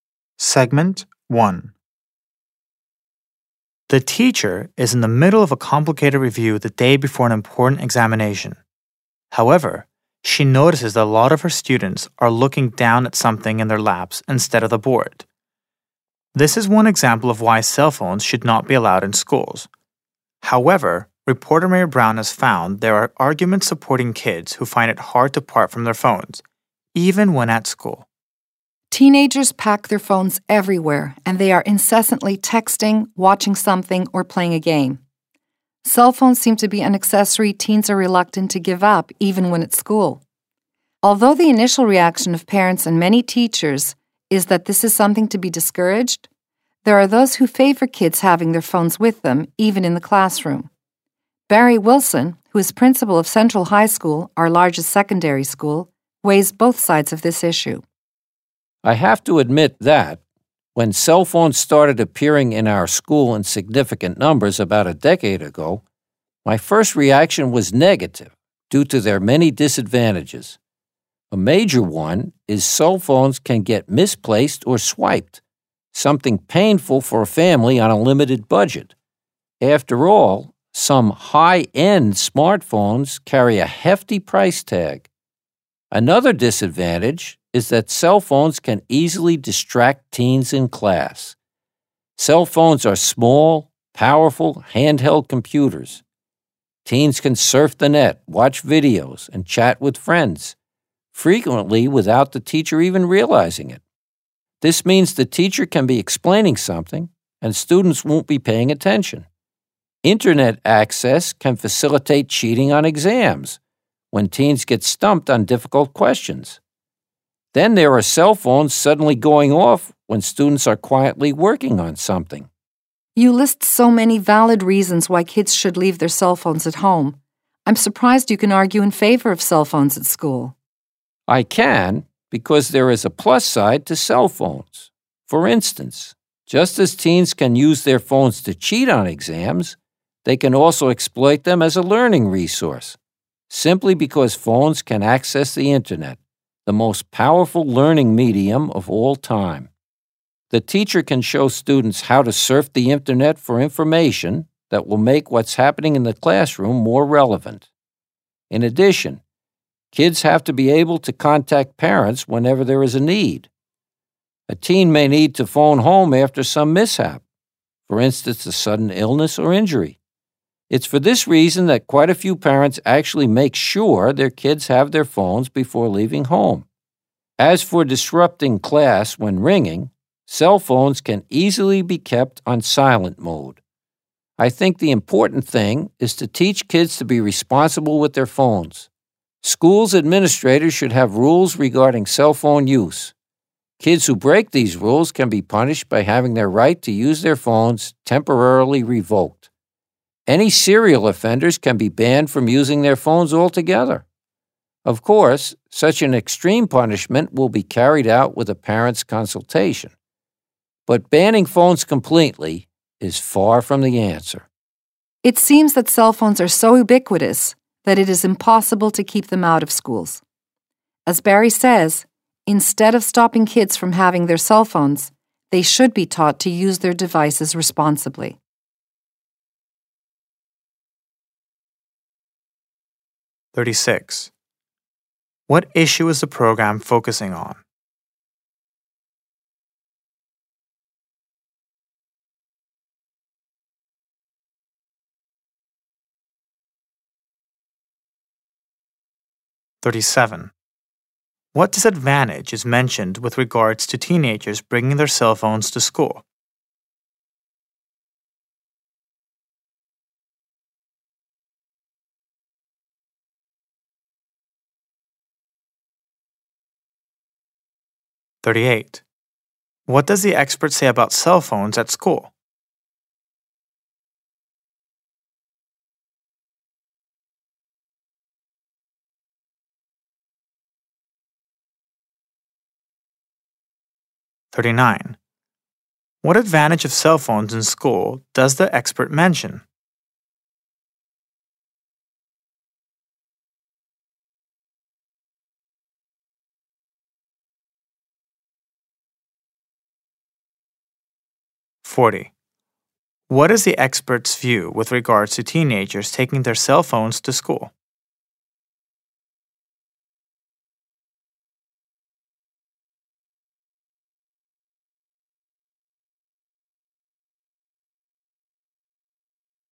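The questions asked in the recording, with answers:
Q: What issue is the program focusing on?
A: Whether cell phones should be allowed in schools

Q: What is the expert's view with regards to teenagers taking their cell phones to school?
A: Phones should be allowed, with rules, and teens should be taught to use them responsibly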